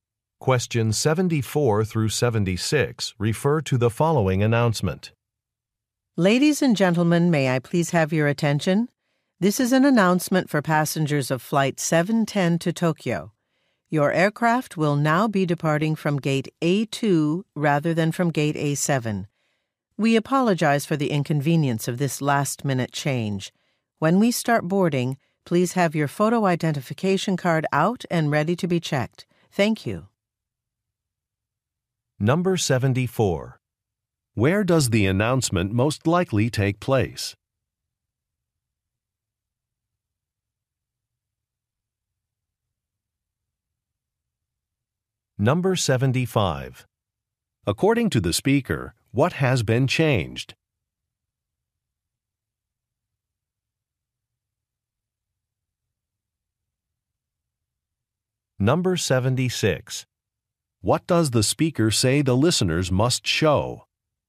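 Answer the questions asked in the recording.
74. At an airport
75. The departure gate
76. Photo identification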